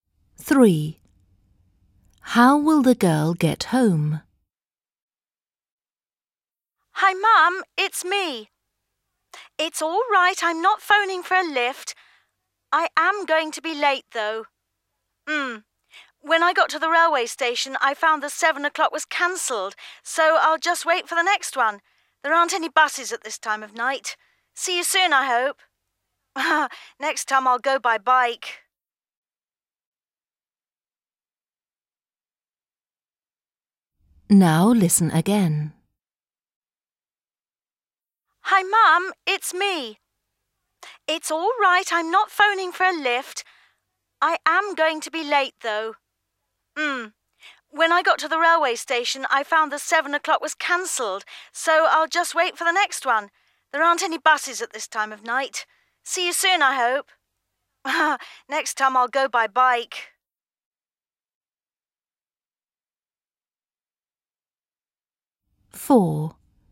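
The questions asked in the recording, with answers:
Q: How will the girl get home?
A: by train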